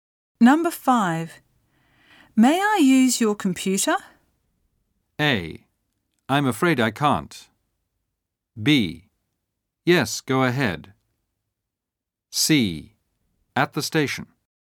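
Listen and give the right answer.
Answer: B: Yes, go ahead.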